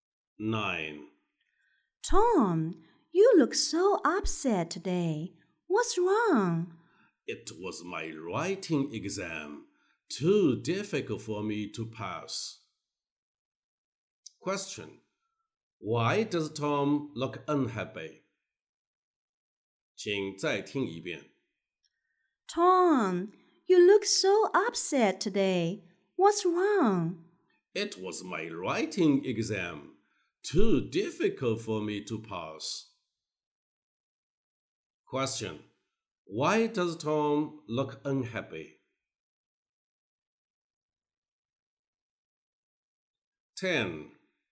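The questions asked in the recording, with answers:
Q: Why does Tom look unhappy?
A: His writing exam was too difficult to pass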